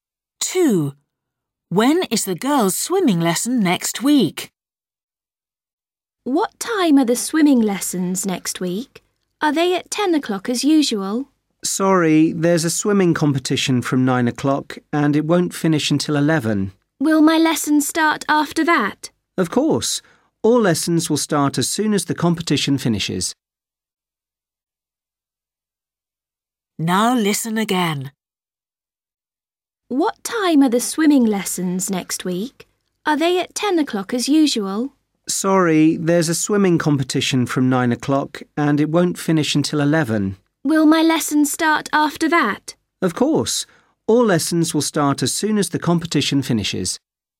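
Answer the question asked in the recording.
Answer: At 11 o'clock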